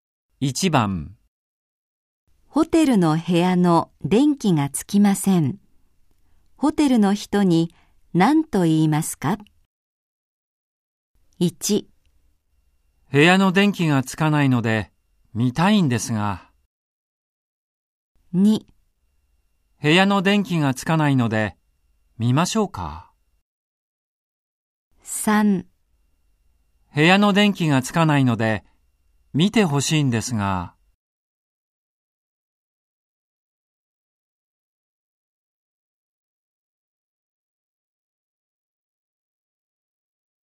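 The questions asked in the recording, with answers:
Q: ホテルの部屋の電気がつきません。ホテルの人に何と言いますか?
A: 3: 部屋の電気がつかないので見てほしいんですが。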